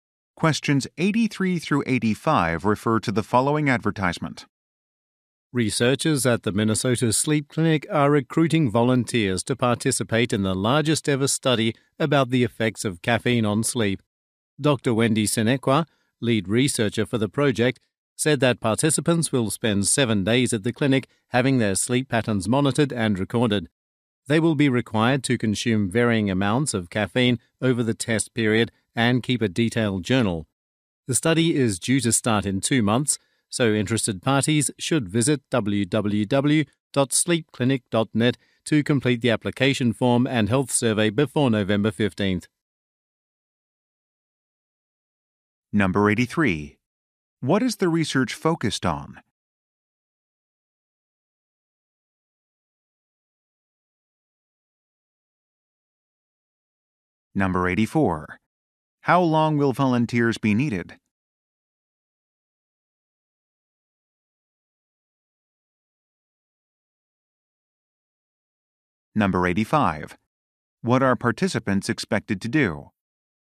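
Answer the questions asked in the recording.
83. The effects of caffeine on sleep
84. 7 days
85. Consume caffeine and keep a detailed journal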